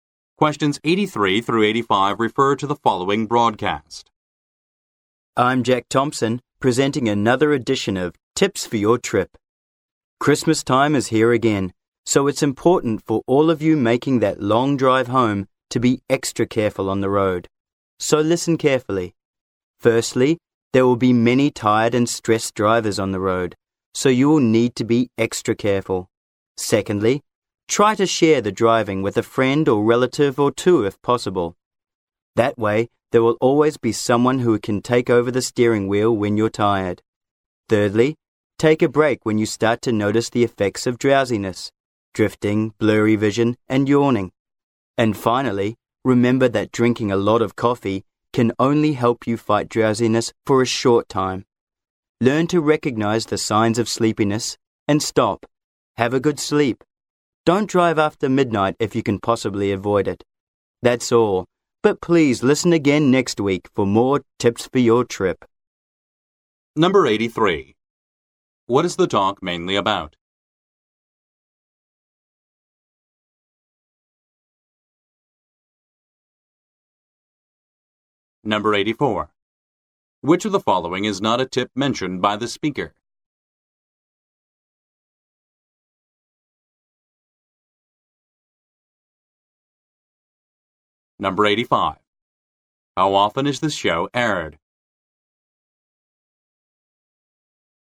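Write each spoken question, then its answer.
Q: What is the talk mainly about?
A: Safe driving tips for the long Christmas drive home

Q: How often is this show aired?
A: Weekly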